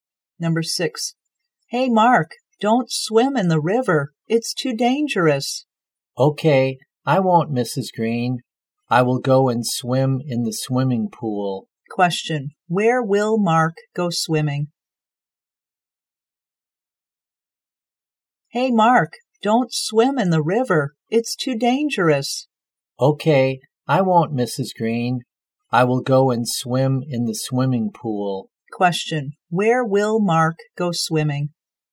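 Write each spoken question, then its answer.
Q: where will Mark go swimming?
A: In the swimming pool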